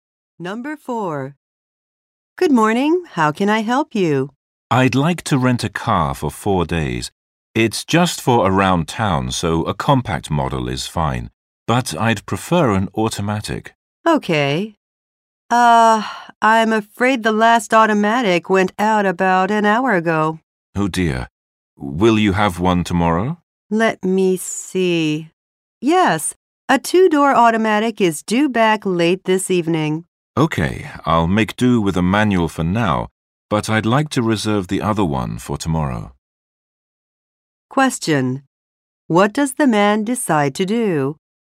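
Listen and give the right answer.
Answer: Rent a manual car for now and reserve an automatic for tomorrow.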